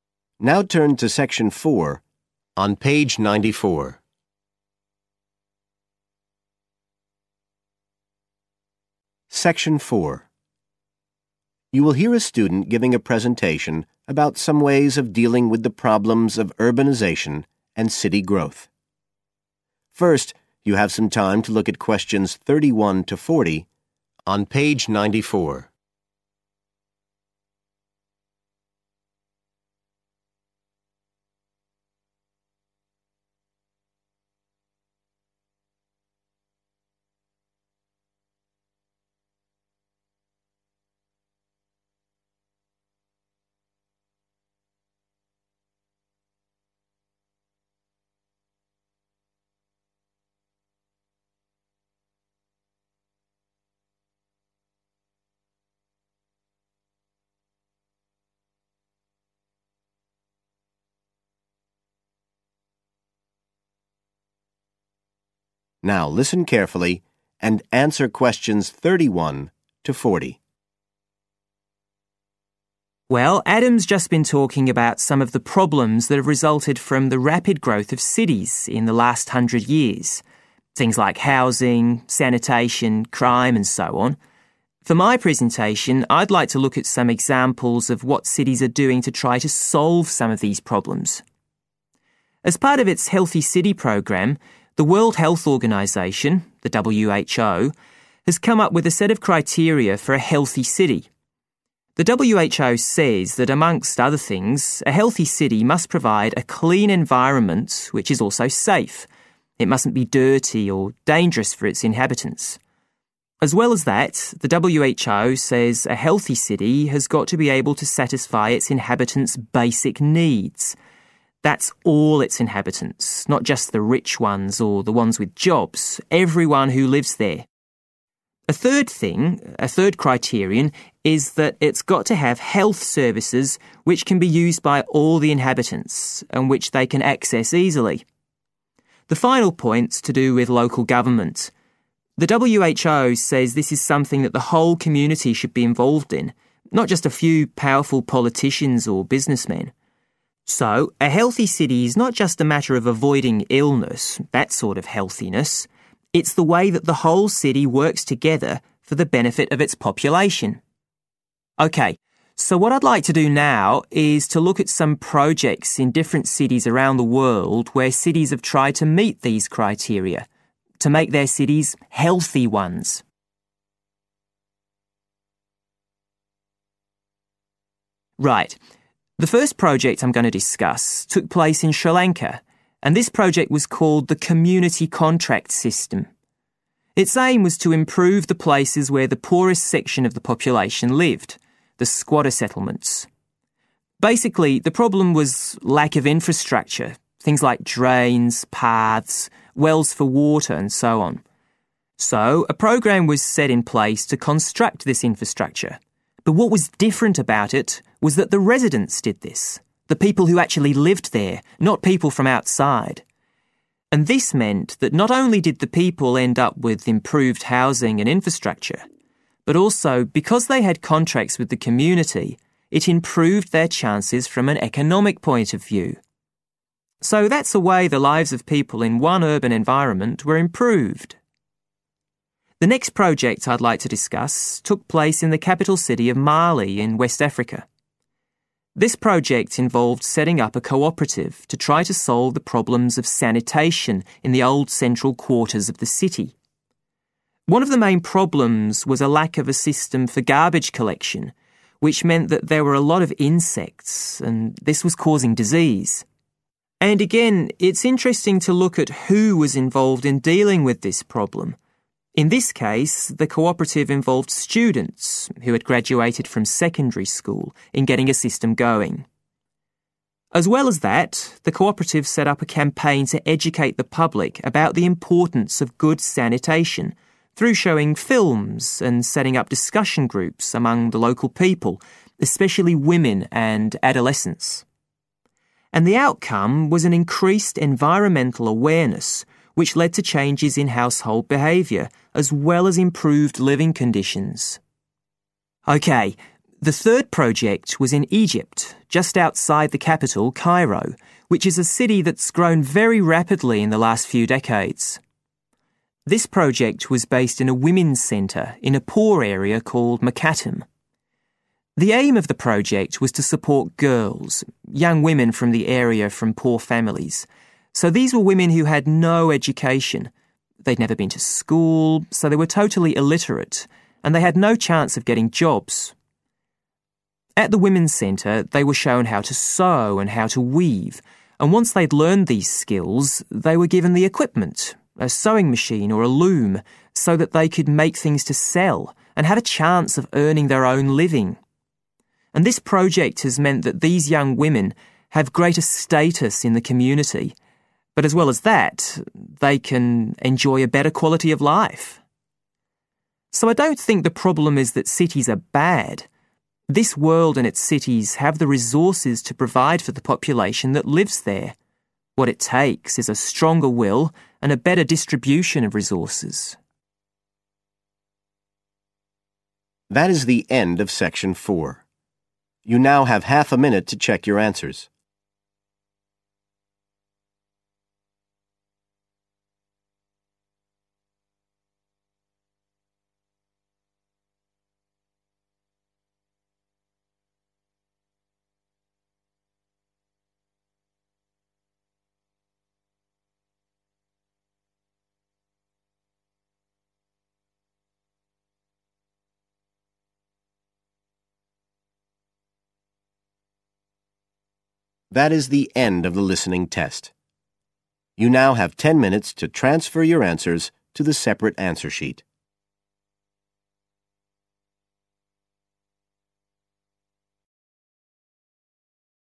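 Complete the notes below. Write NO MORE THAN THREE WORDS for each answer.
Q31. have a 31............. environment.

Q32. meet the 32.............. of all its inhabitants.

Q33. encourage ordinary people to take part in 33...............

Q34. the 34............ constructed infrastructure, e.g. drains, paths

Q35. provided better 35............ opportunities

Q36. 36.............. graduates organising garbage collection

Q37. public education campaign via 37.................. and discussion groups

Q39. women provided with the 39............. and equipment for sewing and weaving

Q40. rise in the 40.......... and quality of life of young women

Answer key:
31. clean and safe
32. basic needs
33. local government
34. residents
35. economic
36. secondary school
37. films
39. skills
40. status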